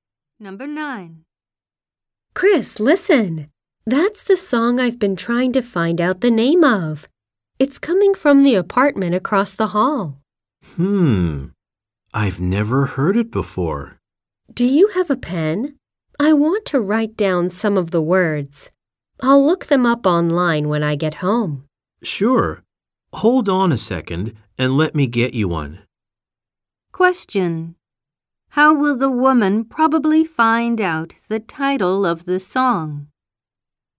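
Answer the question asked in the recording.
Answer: By looking up the words online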